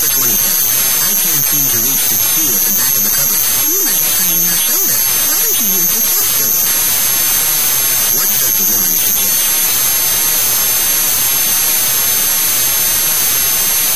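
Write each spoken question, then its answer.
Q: What does the woman suggest?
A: Using the footstool.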